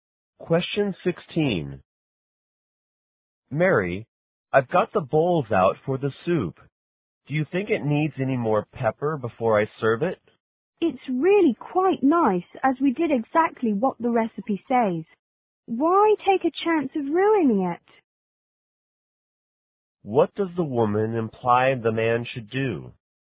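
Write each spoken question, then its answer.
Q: What does the woman imply the man should do?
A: Serve the soup as it is, with no more pepper.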